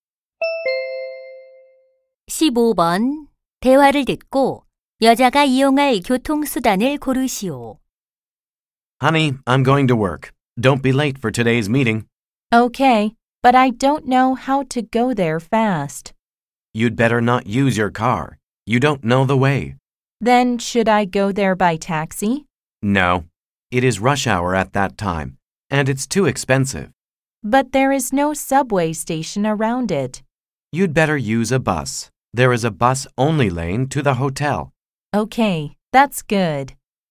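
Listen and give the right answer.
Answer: 버스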